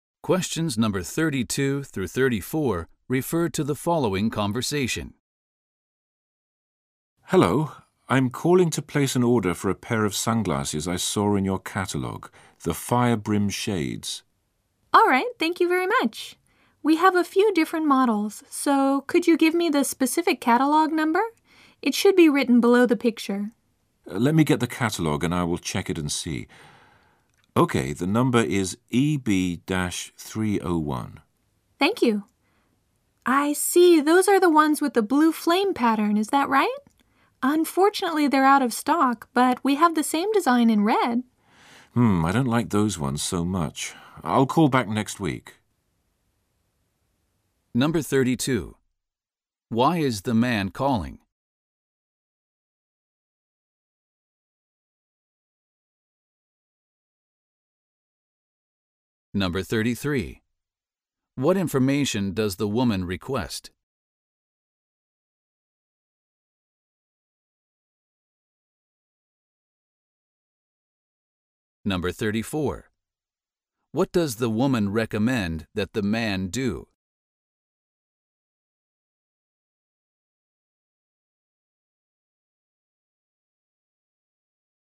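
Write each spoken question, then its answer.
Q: Why is the man calling?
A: To order a pair of sunglasses from the catalogue

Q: What information does the woman request?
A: The catalogue number

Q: What does the woman recommend that the man do?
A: Get the same design in red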